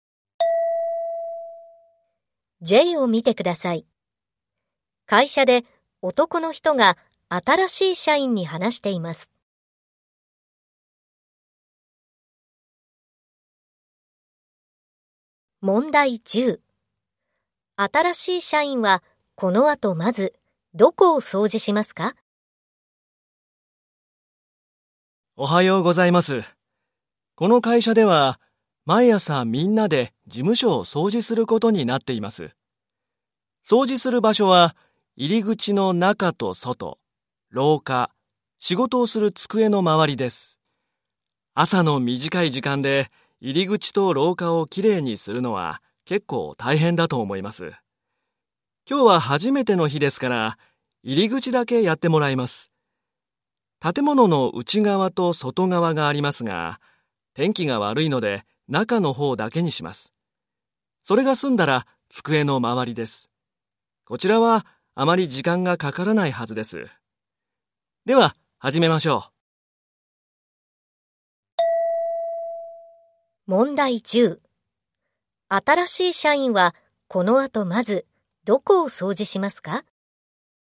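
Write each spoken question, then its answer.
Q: 新しい社員はこの後まずどこを掃除しますか?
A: 入り口の中(内側)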